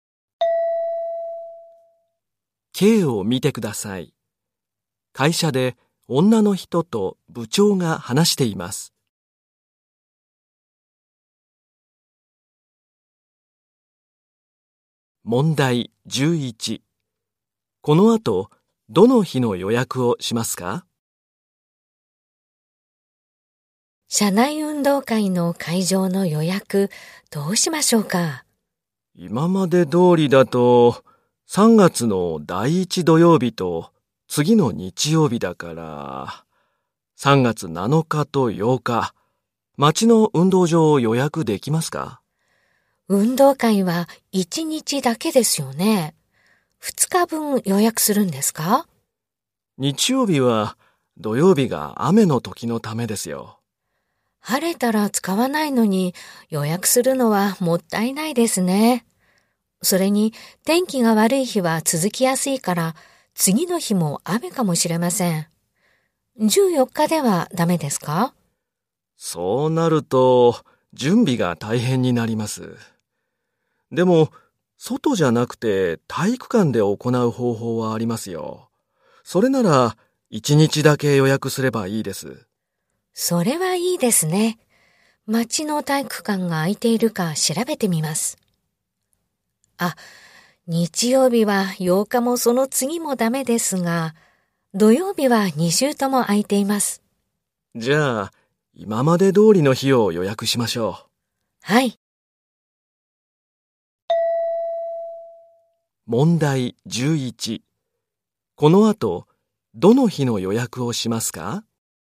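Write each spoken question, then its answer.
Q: この後、どの日の予約をしますか?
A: 3月7日(第1土曜日)の町の体育館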